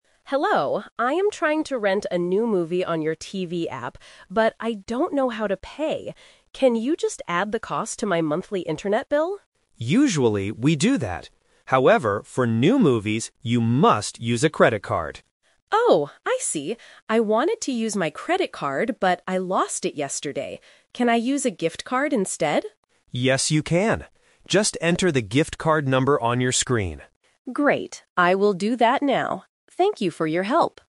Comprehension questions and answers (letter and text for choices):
Listen to the conversation and choose the correct answer (A, B, or C) for each question.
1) What is the customer trying to do?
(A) Rent a movie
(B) Pay her internet bill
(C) Buy a new TV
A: (A) Rent a movie

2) How will the customer finally pay for the movie?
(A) With her internet bill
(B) With a credit card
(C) With a gift card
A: (C) With a gift card

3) Why doesn't the customer use a credit card?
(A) She doesn't have enough money.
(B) She lost it yesterday.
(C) The app doesn't accept credit cards.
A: (B) She lost it yesterday.

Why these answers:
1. In the first sentence, the customer clearly states, "I am trying to rent a new movie". Option B is the trap because the "internet bill" is mentioned later as a payment idea, not the main goal. Option C is not mentioned.
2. The customer asks to use her internet bill (Option A is the trap), but the agent says no. Then, she says she lost her credit card (Option B is the trap). Finally, she asks, "Can I use a gift card instead?" and the agent agrees.
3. The customer explicitly says, "I wanted to use my credit card, but I lost it yesterday." Option C is the trap because the agent actually says she must use a credit card for new movies (meaning the app does accept them). Option A is not mentioned.

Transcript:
Customer: Hello, I am trying to rent a new movie on your TV app. But I don't know how to pay. Can you just add the cost to my monthly internet bill?
Agent: Usually, we do that. However, for new movies, you must use a credit card.
Customer: Oh, I see. I wanted to use my credit card, but I lost it yesterday. Can I use a gift card instead?
Agent: Yes, you can. Just enter the gift card number on your screen.